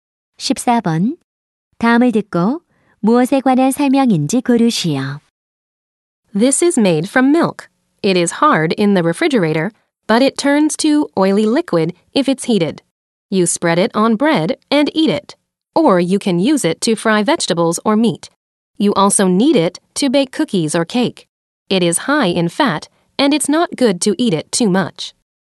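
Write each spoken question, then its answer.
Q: 다음을 듣고 무엇에 관한 설명인지 고르시오.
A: 버터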